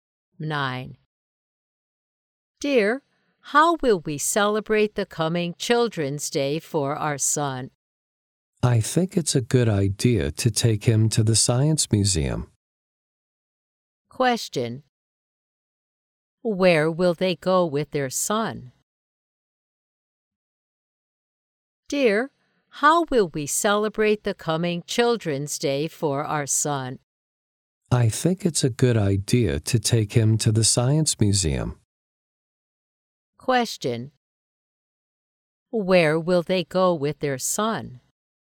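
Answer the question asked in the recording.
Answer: To the Science Museum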